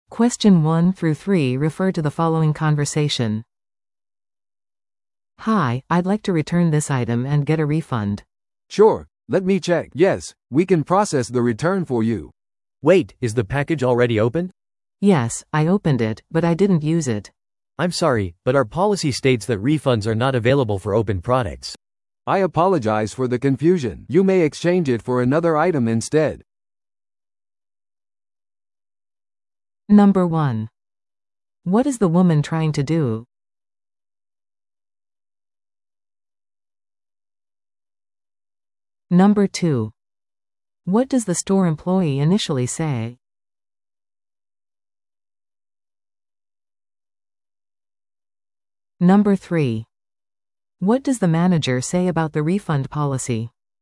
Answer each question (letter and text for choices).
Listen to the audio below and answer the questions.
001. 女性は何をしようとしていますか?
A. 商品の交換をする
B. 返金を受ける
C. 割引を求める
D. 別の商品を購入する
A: B. 返金を受ける

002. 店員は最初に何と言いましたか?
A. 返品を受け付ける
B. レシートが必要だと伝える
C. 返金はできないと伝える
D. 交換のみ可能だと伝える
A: A. 返品を受け付ける

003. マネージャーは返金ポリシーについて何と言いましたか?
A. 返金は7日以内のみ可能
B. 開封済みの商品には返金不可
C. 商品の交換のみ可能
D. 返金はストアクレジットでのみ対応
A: B. 開封済みの商品には返金不可

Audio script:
A: "Hi, I'd like to return this item and get a refund."
B: "Sure, let me check... Yes, we can process the return for you."
C: "Wait, is the package already opened?"
A: "Yes, I opened it, but I didn't use it."
C: "I'm sorry, but our policy states that refunds are not available for opened products."
B: "I apologize for the confusion. You may exchange it for another item instead."